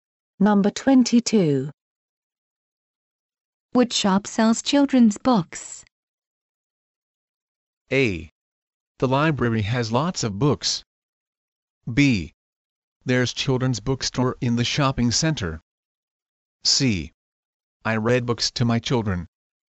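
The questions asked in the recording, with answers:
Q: Which shop sells children's books?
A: B: There's children's bookstore in the shopping center.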